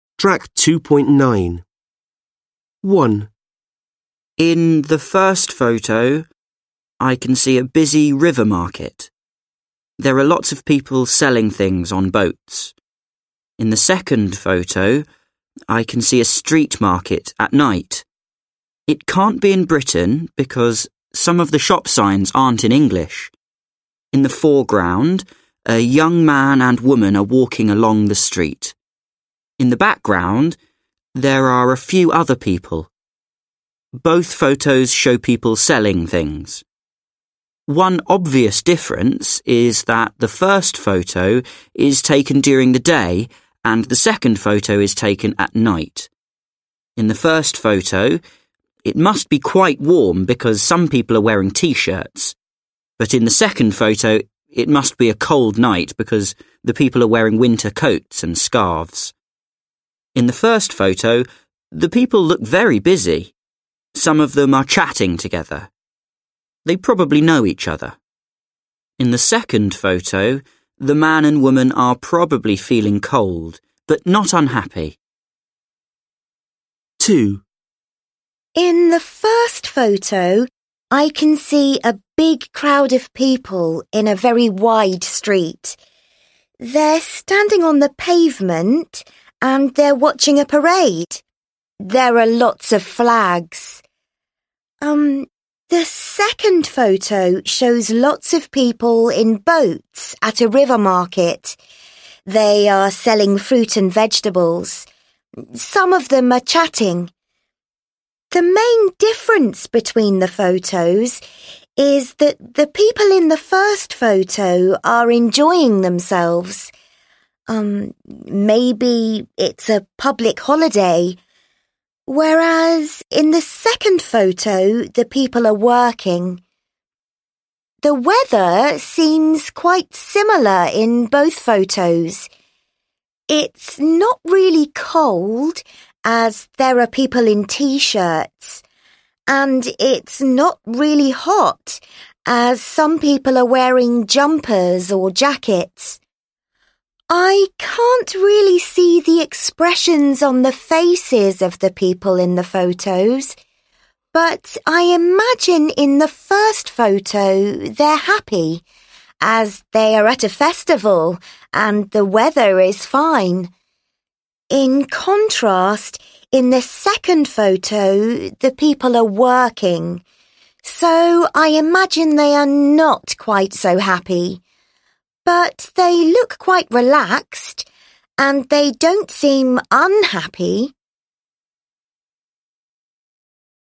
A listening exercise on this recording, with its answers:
Read the Speaking Strategy. Then listen to two candidates comparing the photos. Answer the questions.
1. Which two photos does each student compare?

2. Do they both follow all of the advice?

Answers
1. A vs B
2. Yes, they do

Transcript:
1. In the first photo, I can see a busy river market. There are lots of people selling things on boat. In the second photo, I can see a street market at night. It can't be in Britain because some of the shop signs aren't in English. In the foreground, a young man and woman are walking along the street. In the background, there are a few other people. Both photos show people selling things. One obvious difference is that the first photo is taken during the day and the second photo is taken at night. In the first photo, it must be quite warm because some people are wearing T-shirts. In the second photo, it must be a cold night because the people are wearing winter coats and scarves. In the first photo the people look very busy, some of them are chatting together, they probably know each other. In the second photo, the man and woman are probably feeling cold, but not unhappy.
2. In the first photo, I can see a big crowd of people in a very wide street. They're standing on the pavement and they're watching a parade. The second photo shows lots of people in boat at a river market. They are selling fruits and vegetables. The main difference between the photos is that the people in the first photo are enjoying themselves, uhm, maybe it's a public holiday. The weather seems quite similar in both photos. It's not really cold as there are people in T-shirt and it's not really hot as some people are wearing jumpers or jackets. I can't really see the expressions on the faces of the people in the photo, but I imagine in the first photo they are happy as they are at the festival and the weather is fine. In contrast, in the second photo, the people are walking so I imagine they are not quite so happy, but they look quite relaxed and they don't seem unhappy.

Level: Lớp 10